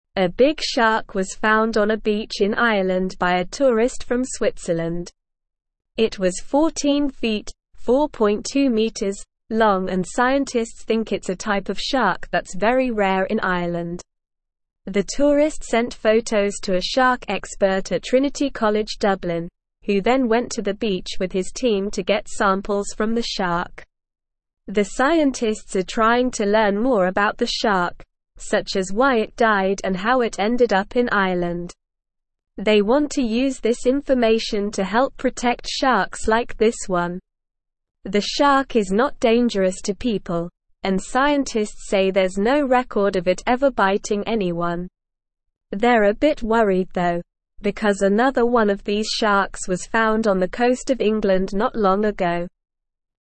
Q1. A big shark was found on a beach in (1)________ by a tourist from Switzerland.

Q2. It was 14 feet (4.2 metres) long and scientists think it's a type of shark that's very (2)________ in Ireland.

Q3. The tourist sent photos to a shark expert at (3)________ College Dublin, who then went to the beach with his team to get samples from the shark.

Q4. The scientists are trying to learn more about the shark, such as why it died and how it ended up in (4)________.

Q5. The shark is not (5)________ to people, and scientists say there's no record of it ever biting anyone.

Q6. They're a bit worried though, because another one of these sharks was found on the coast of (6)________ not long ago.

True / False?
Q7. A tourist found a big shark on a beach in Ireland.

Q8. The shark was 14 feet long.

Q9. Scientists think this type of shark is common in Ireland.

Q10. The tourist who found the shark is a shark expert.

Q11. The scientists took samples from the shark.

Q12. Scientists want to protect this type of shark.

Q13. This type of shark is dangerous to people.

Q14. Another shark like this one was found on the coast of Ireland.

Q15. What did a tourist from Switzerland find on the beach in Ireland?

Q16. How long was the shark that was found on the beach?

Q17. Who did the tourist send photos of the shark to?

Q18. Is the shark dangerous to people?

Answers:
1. Ireland
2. rare
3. Trinity
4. Ireland
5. dangerous
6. England
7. True
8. True
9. False
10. False
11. True
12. True
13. False
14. False
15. The tourist found a big shark on the beach in Ireland.
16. The shark was 14 feet (4.2 metres) long.
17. The tourist sent photos of the shark to a shark expert at Trinity College Dublin.
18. No, the shark is not dangerous to people.

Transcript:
A big shark was found on a beach in Ireland by a tourist from Switzerland. It was 14 feet (4.2 metres) long and scientists think it's a type of shark that's very rare in Ireland. The tourist sent photos to a shark expert at Trinity College Dublin, who then went to the beach with his team to get samples from the shark. The scientists are trying to learn more about the shark, such as why it died and how it ended up in Ireland. They want to use this information to help protect sharks like this one. The shark is not dangerous to people, and scientists say there's no record of it ever biting anyone. They're a bit worried though, because another one of these sharks was found on the coast of England not long ago.

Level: Level 1